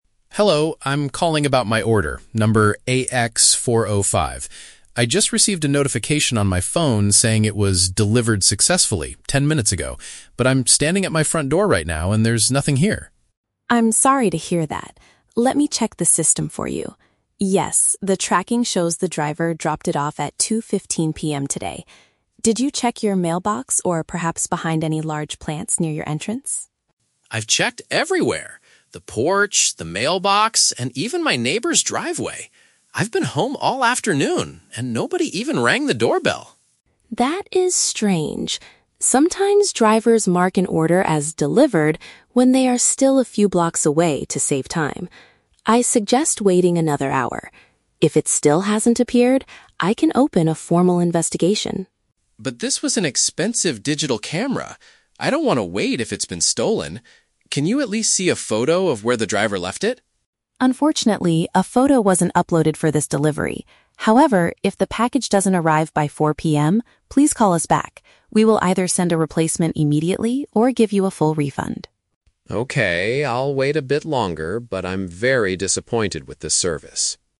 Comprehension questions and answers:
Listen to a conversation between a customer and a customer service agent. Choose the best answer (A, B, or C) for each question.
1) What is the customer's main problem?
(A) He received the wrong item in his delivery box.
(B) His tracking status says the item arrived, but he cannot find it.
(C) He missed the delivery driver because he was not at home.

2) According to the agent, why might the status be "delivered" even if the box isn't there?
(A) The driver might have made a mistake and delivered it to a neighbor.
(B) The system often has technical bugs that show incorrect information.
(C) Drivers sometimes update the status before they actually arrive at the house.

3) What is the final solution offered by the agent if the camera doesn't appear?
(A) The company will provide a new product or return the customer's money.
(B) The customer must go to the local post office to pick up the item himself.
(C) The driver will return to the house to take a photo of the empty porch.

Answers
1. (B) His tracking status says the item arrived, but he cannot find it.
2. (C) Drivers sometimes update the status before they actually arrive at the house.
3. (A) The company will provide a new product or return the customer's money.

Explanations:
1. The customer says the app says "delivered successfully," but "there's nothing here." Option B paraphrases this as "tracking status says the item arrived, but he cannot find it." Why the trap is wrong: Option (A) is not mentioned. Option (C) is a trap; the customer says, "I've been home all afternoon," so he didn't miss the driver due to absence.
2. The agent explains that "drivers mark an order as 'delivered' when they are still a few blocks away to save time." Option C reflects this behavior. Why the trap is wrong: Option (A) is a guess made by the customer ("even my neighbor's driveway"), but the agent doesn't confirm this as the reason. Option (B) is not mentioned.
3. The agent promises to "either send a replacement immediately or give you a full refund." Option A uses synonyms: "new product" (replacement) and "return the customer's money" (refund). Why the trap is wrong: Option (B) is a common shipping procedure but not mentioned here. Option (C) is a trap; the agent mentions the lack of a photo, but doesn't say the driver will come back just to take one.

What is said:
Customer: Hello, I'm calling about my order, number AX-405. I just received a notification on my phone saying it was "delivered successfully" ten minutes ago, but I'm standing at my front door right now and there's nothing here.
Agent: I'm sorry to hear that. Let me check the system for you. Yes, the tracking shows the driver dropped it off at 2:15 PM today. Did you check your mailbox or perhaps behind any large plants near your entrance?
Customer: I've checked everywhere! The porch, the mailbox, and even my neighbor's driveway. I've been home all afternoon, and nobody even rang the doorbell.
Agent: That is strange. Sometimes, drivers mark an order as "delivered" when they are still a few blocks away to save time. I suggest waiting another hour. If it still hasn't appeared, I can open a formal investigation.
Customer: But this was an expensive digital camera! I don't want to wait if it's been stolen. Can you at least see a photo of where the driver left it?
Agent: Unfortunately, a photo wasn't uploaded for this delivery. However, if the package doesn't arrive by 4:00 PM, please call us back. We will either send a replacement immediately or give you a full refund.
Customer: Okay, I'll wait a bit longer, but I'm very disappointed with this service.

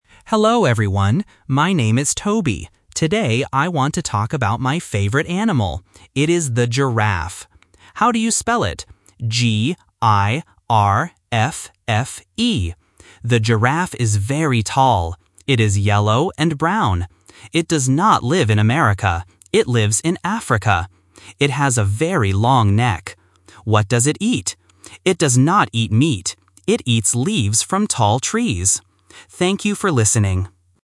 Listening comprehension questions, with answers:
Listen to a student talking about his favorite animal. Choose the correct answer (A, B, or C).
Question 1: What animal does Toby spell?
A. A gorilla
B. A giraffe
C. A goat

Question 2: Where does the animal live?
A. In America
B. In Africa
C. In Asia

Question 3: What does the animal eat?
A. Meat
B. Grass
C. Leaves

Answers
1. B. A giraffe
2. B. In Africa
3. C. Leaves

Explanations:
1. Toby says his favorite animal is the giraffe and spells it: "G-I-R-A-F-F-E". Option A (A gorilla) and Option C (A goat) also start with the letter G, which makes them good distractors for spelling, but they are not the correct word.
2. Toby says, "It does not live in America. It lives in Africa." Option A (In America) is the trap because it is mentioned in the audio but rejected by the word "not". Option C (In Asia) is not mentioned.
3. Toby asks, "What does it eat?" and then answers, "It does not eat meat. It eats leaves from tall trees." Option A (Meat) is the trap because it is mentioned but Toby says it does not eat it. Option B (Grass) is a common food for animals but is not mentioned in the audio.

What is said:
Toby: Hello, everyone. My name is Toby. Today, I want to talk about my favorite animal. It is the giraffe. How do you spell it? G-I-R-A-F-F-E. The giraffe is very tall. It is yellow and brown. It does not live in America. It lives in Africa. It has a very long neck. What does it eat? It does not eat meat. It eats leaves from tall trees. Thank you for listening.

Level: A1

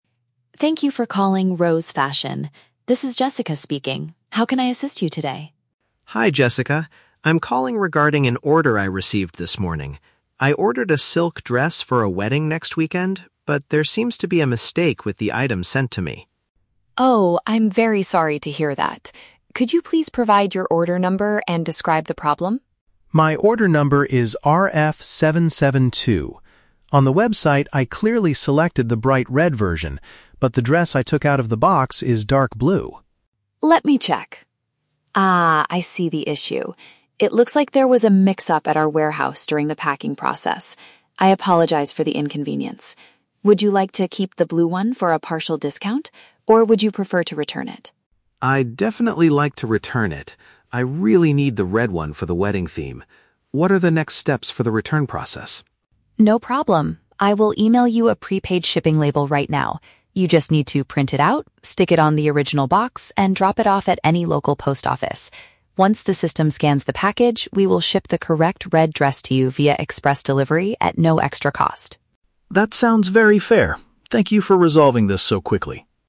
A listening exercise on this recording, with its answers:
Listen to a conversation between a customer and a seller. Choose the best answer (A, B, or C) for each question.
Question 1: Why is the customer dissatisfied with her purchase?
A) The silk dress she received is too small for her to wear.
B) The color of the product does not match what she originally ordered.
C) The dress arrived too late for the wedding ceremony next weekend.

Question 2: What reason does the seller give for the mistake?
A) There was an error made by the staff at the distribution center.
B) The red version of the dress is currently out of stock.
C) The customer accidentally clicked on the wrong color on the website.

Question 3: What must the customer do to send the dress back?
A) Pay for the shipping costs at the post office herself.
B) Wait for a delivery driver to come to her house and pick it up.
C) Attach a special document provided by the seller to the package.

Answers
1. B) The color of the product does not match what she originally ordered.
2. A) There was an error made by the staff at the distribution center.
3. C) Attach a special document provided by the seller to the package.

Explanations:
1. The customer explains, "I clearly selected the bright red version, but the dress I took out of the box is dark blue." Option B paraphrases this as the color not matching her order. Why the trap is wrong: Option (A) is a plausible clothing issue but is not mentioned. Option (C) is a trap; she mentions the wedding is "next weekend," meaning it hasn't happened yet, so it didn't arrive "too late."
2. The seller admits, "It looks like there was a mix-up at our warehouse during the packing process." Option A uses "distribution center" as a synonym for "warehouse." Why the trap is wrong: Option (B) is a common retail excuse but is not mentioned here. Option (C) is a trap; the seller confirms she saw the issue in the system, implying the customer was correct.
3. The seller tells her to "print out" a "prepaid shipping label" and "stick it on the original box." Option C paraphrases this as "attach a special document provided by the seller." Why the trap is wrong: Option (A) is a trap; the label is "prepaid," meaning the customer doesn't have to pay. Option (B) is a trap; the customer has to "drop it off at any local post office," not wait for a home pickup.

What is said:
Seller: Thank you for calling Rose Fashion. This is Jessica speaking. How can I assist you today?
Customer: Hi Jessica. I'm calling regarding an order I received this morning. I ordered a silk dress for a wedding next weekend, but there seems to be a mistake with the item sent to me.
Seller: Oh, I'm very sorry to hear that. Could you please provide your order number and describe the problem?
Customer: My order number is RF-772. On the website, I clearly selected the bright red version, but the dress I took out of the box is dark blue.
Seller: Let me check... Ah, I see the issue. It looks like there was a mix-up at our warehouse during the packing process. I apologize for the inconvenience. Would you like to keep the blue one for a partial discount, or would you prefer to return it?
Customer: I'd definitely like to return it. I really need the red one for the wedding theme. What are the next steps for the return process?
Seller: No problem. I will email you a prepaid shipping label right now. You just need to print it out, stick it on the original box, and drop it off at any local post office. Once the system scans the package, we will ship the correct red dress to you via express delivery at no extra cost.

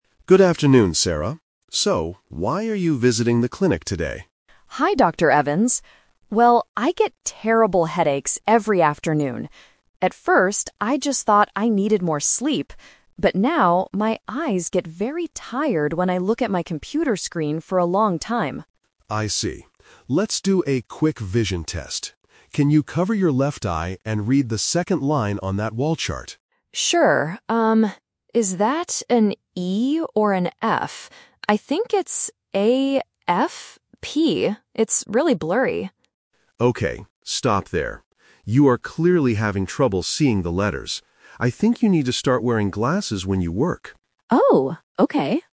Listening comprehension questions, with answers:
Listen to a conversation between an eye doctor and a patient. Choose the correct answer (A, B, or C) for each question.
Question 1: What is the patient's main health problem?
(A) She cannot sleep well at night.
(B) Her eyes get tired and her head hurts.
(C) Her computer screen is broken.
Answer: (B) Her eyes get tired and her head hurts.

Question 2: What does the doctor ask the patient to do first?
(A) Look closely at a computer screen.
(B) Put on some new glasses.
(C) Cover one eye and read some letters.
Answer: (C) Cover one eye and read some letters.

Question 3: What did the patient originally think caused her problem?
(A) She thought she needed more sleep.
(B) She thought her glasses were too old.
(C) She thought she read too many books.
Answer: (A) She thought she needed more sleep.

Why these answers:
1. The patient explicitly says, "I get terrible headaches... my eyes get very tired." The Trap: Option A is the A2 "Twist" trap. The patient says, "At first, I just thought I needed more sleep," but that is not the actual problem. Option C is a trap because the computer screen makes her eyes tired, but the screen itself is not broken.
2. The doctor says, "Can you cover your left eye and read the second line on that wall chart?" The Trap: Option B is a trap. The doctor says she needs to start wearing glasses at the end of the audio, but he does not ask her to put them on during the test. Option A is a trap because they talk about a computer screen, but it is not part of the eye test.
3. The patient says, "At first, I just thought I needed more sleep." This was her original guess. The Trap: Option B is a trap because the doctor mentions glasses, but she does not have any yet. Option C is a plausible cause for eye pain, but reading books is not mentioned in the audio.

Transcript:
Doctor: Good afternoon, Sarah. So, why are you visiting the clinic today?
Patient: Hi, Dr. Evans. Well, I get terrible headaches every afternoon. At first, I just thought I needed more sleep. But now, my eyes get very tired when I look at my computer screen for a long time.
Doctor: I see. Let's do a quick vision test. Can you cover your left eye and read the second line on that wall chart?
Patient: Sure. is that an E or an F? I think it's A... F... It's really blurry.
Doctor: Okay, stop there. You are clearly having trouble seeing the letters. I think you need to start wearing glasses when you work.

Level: A2

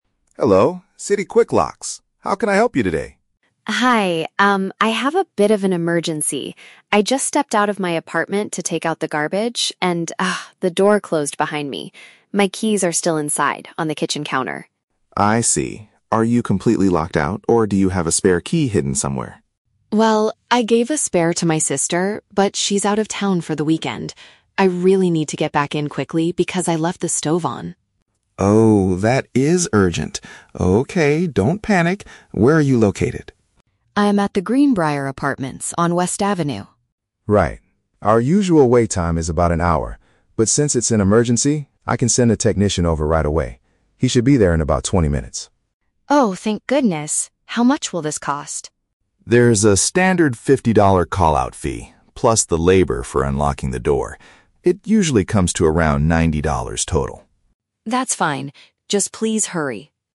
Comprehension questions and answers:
Listen to a phone conversation between a customer and a locksmith. Then, read the questions and choose the correct answer (A, B, or C).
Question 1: How did the customer lose access to her apartment?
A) She accidentally dropped her keys in the trash.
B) The door shut automatically when she went outside.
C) She locked the door from the outside by mistake.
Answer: B) The door shut automatically when she went outside.

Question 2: Why is the customer in a hurry to get back inside?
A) She left a cooking appliance running.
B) She needs to contact her sister immediately.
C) She left her mobile phone in the kitchen.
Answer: A) She left a cooking appliance running.

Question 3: How long will the customer have to wait for the technician?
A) Approximately one hour.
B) Exactly 90 minutes.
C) Less than half an hour.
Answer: C) Less than half an hour.

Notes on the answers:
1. The customer says, "I just stepped out... and the door closed behind me." This means the door shut on its own. Trap A: Incorrect. The audio mentions "take out the garbage," but she didn't drop her keys in it. Her keys are on the kitchen counter. Trap C: Incorrect. This is a plausible situation, but she didn't lock it with a key from the outside.
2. The customer states, "I left the stove on!" A stove is a type of cooking appliance. Trap B: Incorrect. The audio mentions her sister, but only to explain that her sister has the spare key and is "out of town." She doesn't need to call her. Trap C: Incorrect. She mentions the "kitchen counter," but that is where her keys are, not her phone (she is currently using a phone to make the call).
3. The locksmith promises the technician will be there in "about 20 minutes." Twenty minutes is less than half an hour (30 minutes). Trap A: Incorrect. The locksmith mentions that their "usual wait time is about an hour," but because this is an emergency, they are coming much faster. Trap B: Incorrect. The number "90" is mentioned, but it refers to the total cost in dollars ($90), not the wait time.

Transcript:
Locksmith: "Hello, City Quick Locks. How can I help you today?"
Customer: "Hi, um, I have a bit of an emergency. I just stepped out of my apartment to take out the garbage, and, ah, the door closed behind me. My keys are still inside on the kitchen counter."
Locksmith: "I see. Are you completely locked out, or do you have a spare key hidden somewhere?"
Customer: "Well, I gave a spare to my sister, but she's out of town for the weekend. I really need to get back in quickly because I left the stove on!"
Locksmith: "Oh, that is urgent. Okay, don't panic. Where are you located?"
Customer: "I'm at the Greenbriar Apartments on West Avenue."
Locksmith: "Right. Our usual wait time is about an hour, but since it's an emergency, I can send a technician over right away. He should be there in about 20 minutes."
Customer: "Oh, thank goodness! How much will this cost?"
Locksmith: "There's a standard $50 call-out fee, plus the labor for unlocking the door. It usually comes to around $90 total."
Customer: "That's fine, just please hurry!"

